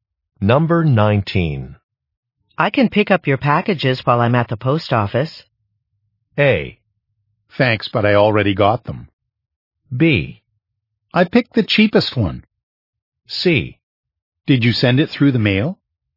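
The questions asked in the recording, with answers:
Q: I can pick up your packages while I'm at the post office.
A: A: Thanks, but I already got them.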